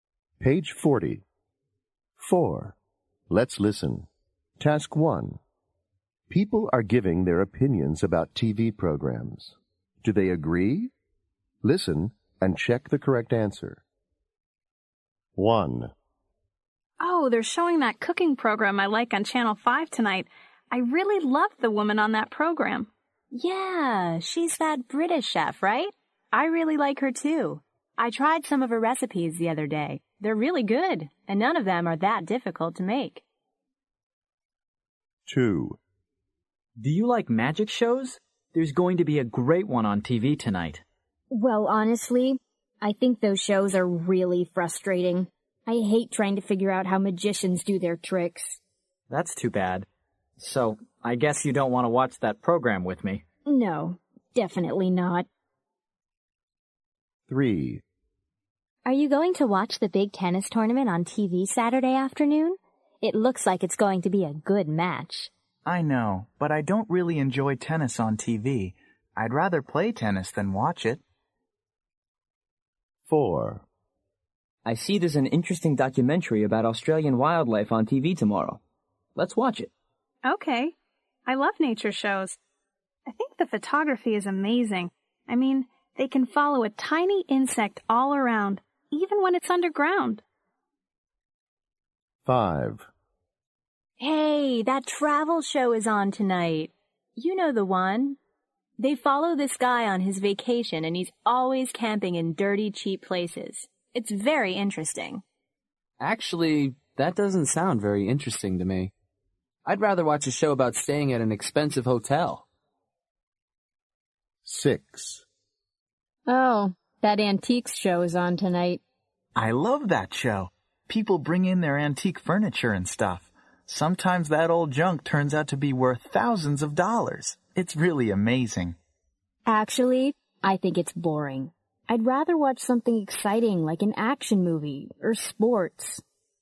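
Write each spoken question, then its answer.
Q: Do they agree?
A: Yes, they agree

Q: Do they agree?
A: No, they disagree

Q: Do they agree?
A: No, they disagree

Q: Do they agree?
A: Yes, they agree

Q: Do they agree?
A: No, they disagree

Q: Do they agree?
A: No, they disagree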